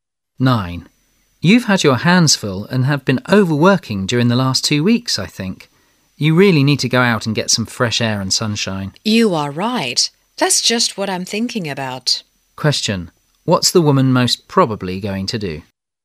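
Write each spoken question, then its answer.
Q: What's the woman most probably going to do?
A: Go out for fresh air and sunshine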